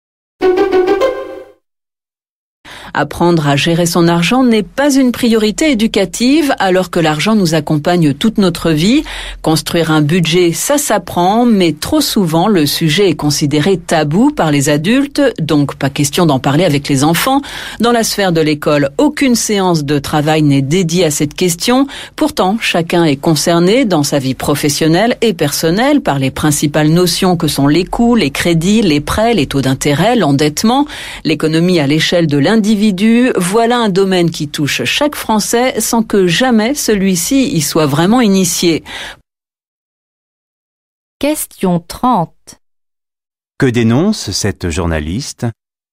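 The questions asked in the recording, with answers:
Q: Que dénonce cette journaliste ?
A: Le manque d'éducation à la gestion de l'argent.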